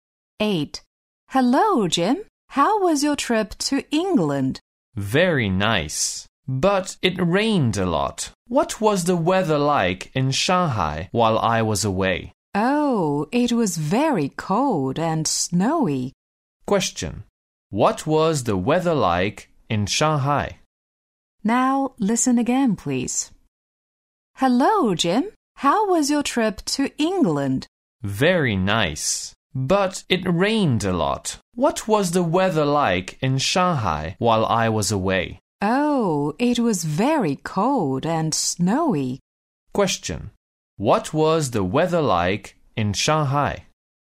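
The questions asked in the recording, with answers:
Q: What was the weather like in Shanghai?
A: Very cold and snowy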